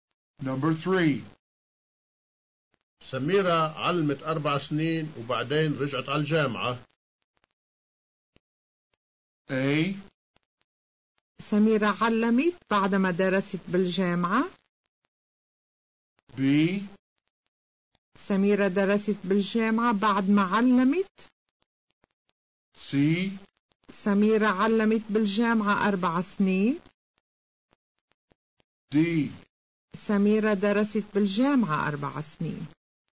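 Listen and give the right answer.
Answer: B: سميرة درست بالجامعة بعد ما علمت.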